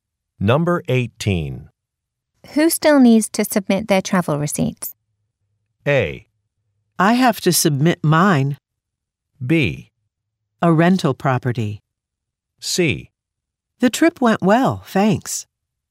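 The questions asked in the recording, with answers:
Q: Who still needs to submit their travel receipts?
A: A: I have to submit mine.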